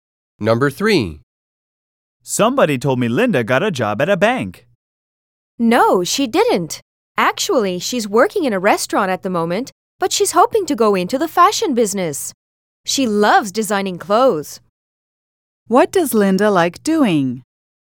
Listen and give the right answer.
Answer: The woman said that Linda loves designing clothes.